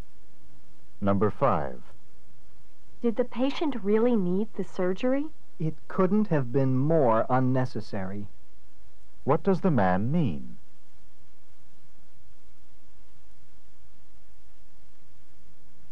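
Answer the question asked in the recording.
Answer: The surgery was completely unnecessary.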